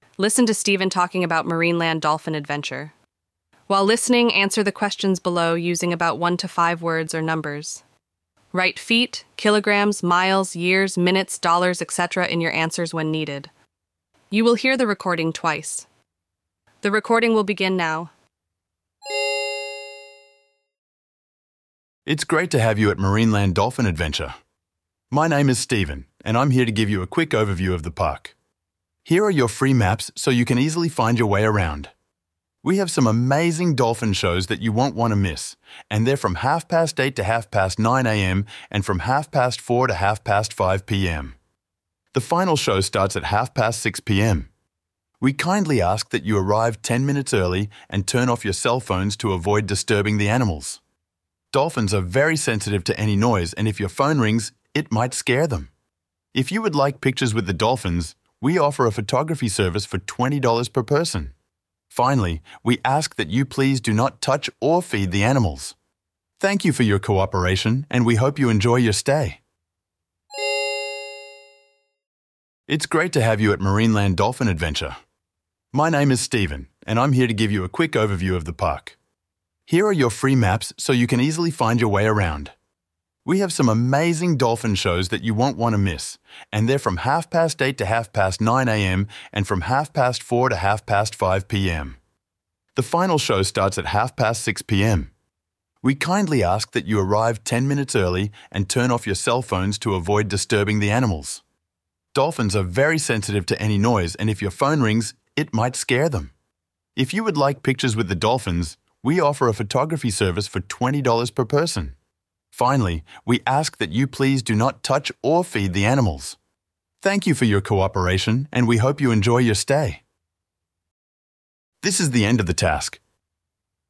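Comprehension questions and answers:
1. When are the shows in the morning? The morning show is from to AM.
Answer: 8:30 / 9:30

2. When does the final show start? The final show starts at PM.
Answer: 6:30

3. What are visitors not allowed to use? – They are not allowed to use .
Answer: cell phones

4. How much money does a picture with the dolphins cost? – It costs per person.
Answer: $20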